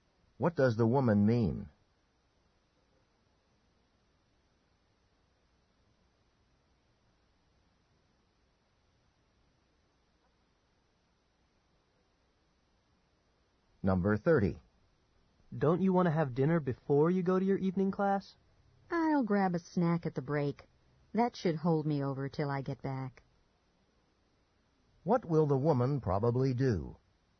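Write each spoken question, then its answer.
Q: What will the woman probably do?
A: Eat a snack during the class break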